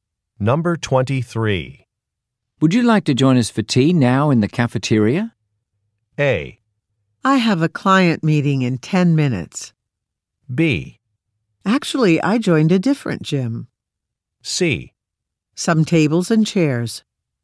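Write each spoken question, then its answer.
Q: Would you like to join us for tea now in the cafeteria?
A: A: I have a client meeting in 10 minutes.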